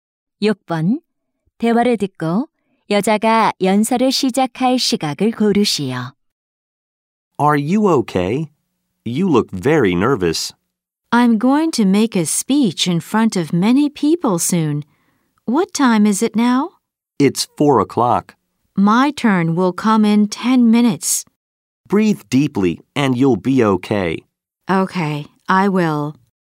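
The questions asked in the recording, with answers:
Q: 대화를 듣고 여자가 연설을 시작할 시각을 고르시오.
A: 4시 10분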